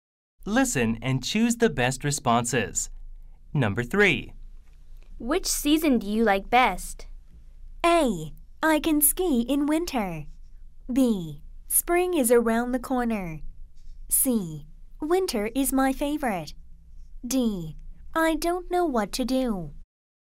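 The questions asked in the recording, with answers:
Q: Which season do you like best?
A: C: Winter is my favorite.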